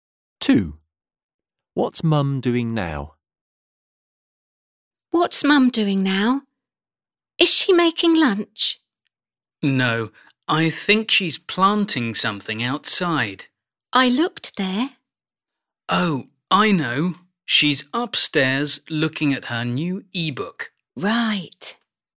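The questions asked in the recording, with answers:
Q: What's Mum doing now?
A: Looking at her new e-book upstairs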